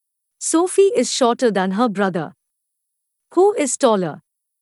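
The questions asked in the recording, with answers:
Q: Who is taller?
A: Her brother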